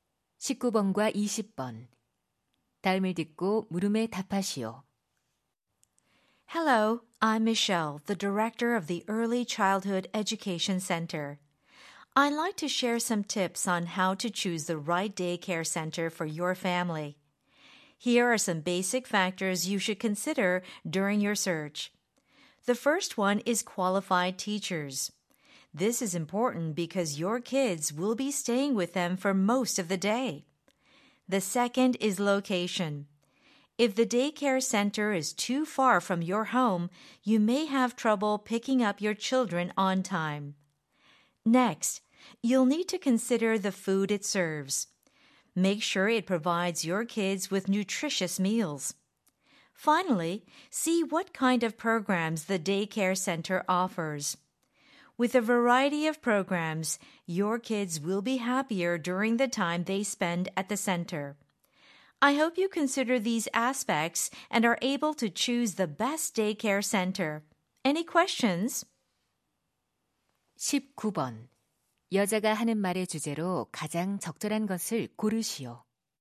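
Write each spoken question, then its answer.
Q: 19번. 여자가 하는 말의 주제로 가장 적절한 것을 고르시오.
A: 알맞은 어린이집을 고를 때 고려할 사항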